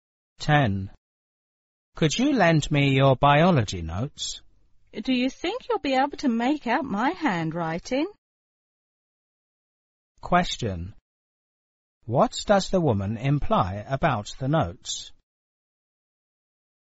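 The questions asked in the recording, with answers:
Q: What does the woman imply about the notes?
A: Her handwriting may be hard to read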